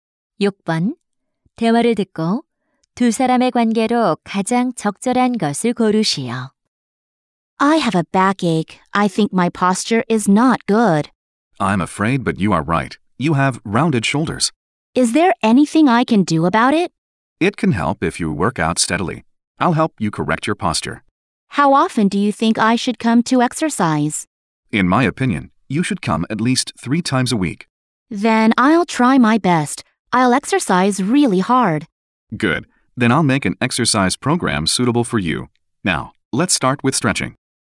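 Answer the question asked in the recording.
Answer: 헬스 트레이너와 회원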